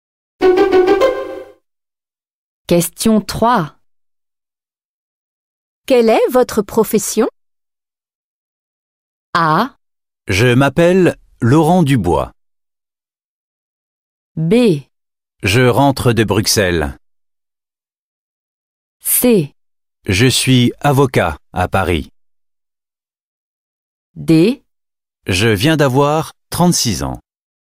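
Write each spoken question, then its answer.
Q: Quelle est votre profession?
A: C: Je suis avocat à Paris.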